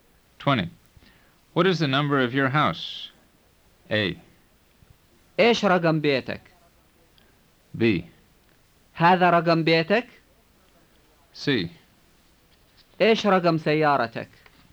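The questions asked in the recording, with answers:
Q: What is the number of your house?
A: A: إيش رقم بيتك؟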